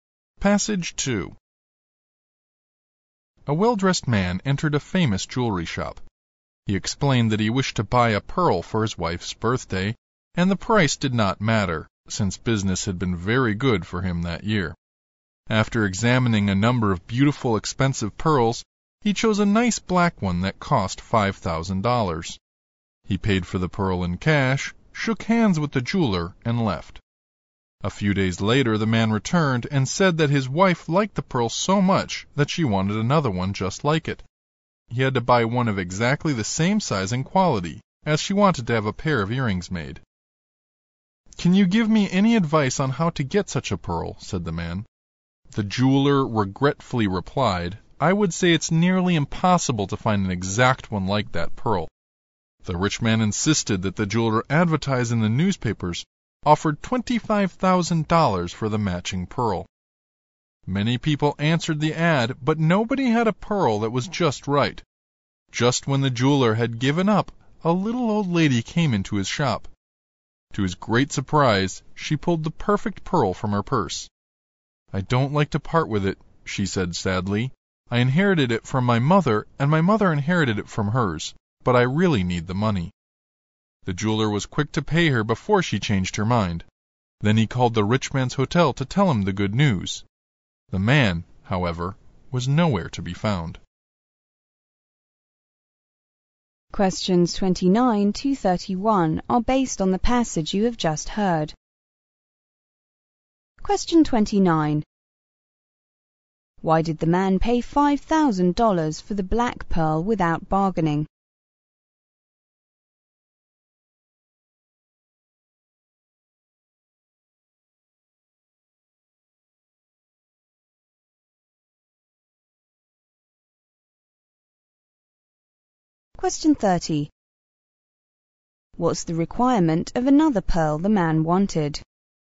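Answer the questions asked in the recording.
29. He wanted to appear rich, saying business had been very good
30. Exactly the same size and quality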